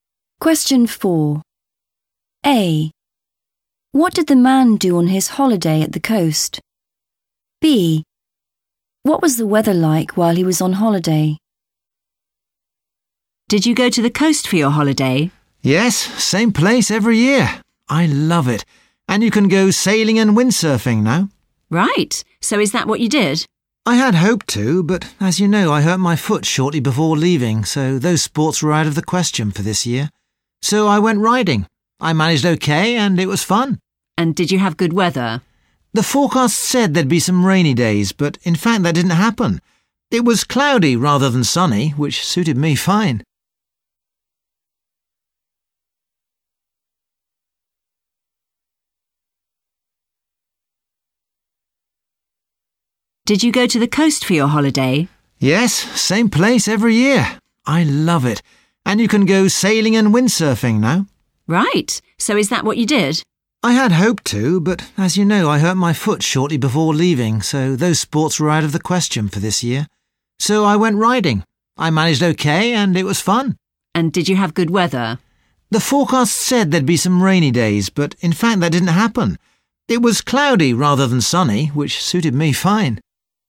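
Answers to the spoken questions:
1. went riding
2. cloudy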